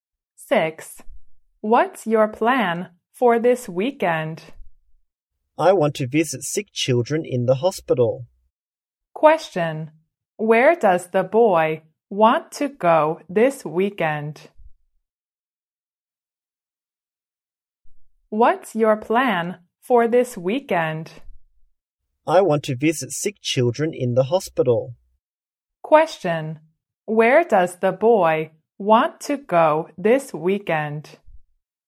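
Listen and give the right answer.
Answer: To the hospital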